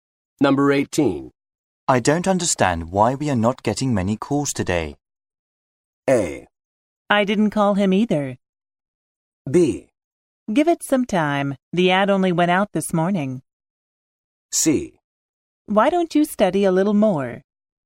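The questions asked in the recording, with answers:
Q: I don't understand why we are not getting many calls today.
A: B: Give it some time. The ad only went out this morning.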